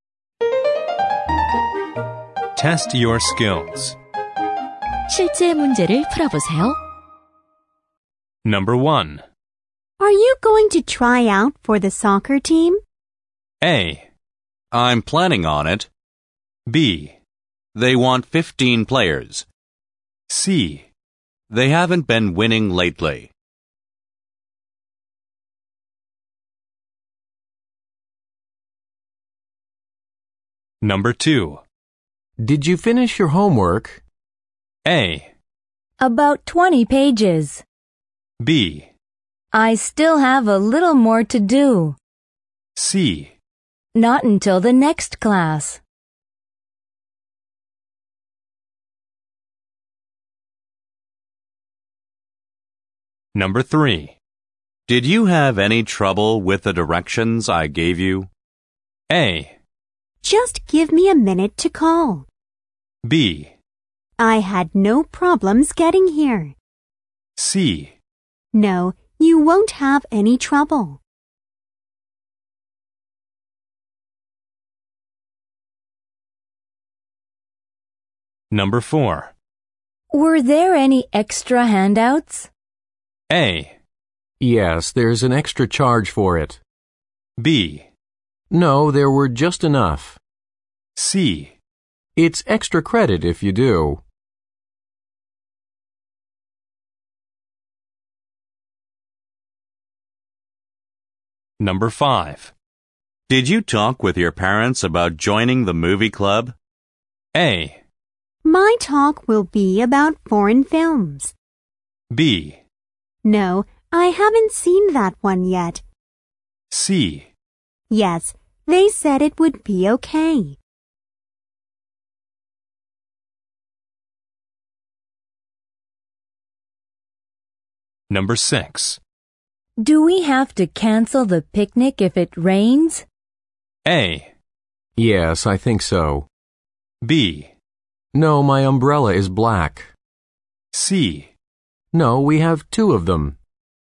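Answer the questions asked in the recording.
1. A: I'm planning on it.
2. B: I still have a little more to do.
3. B: I had no problems getting here.
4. B: No, there were just enough.
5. C: Yes, they said it would be okay.
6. A: Yes, I think so.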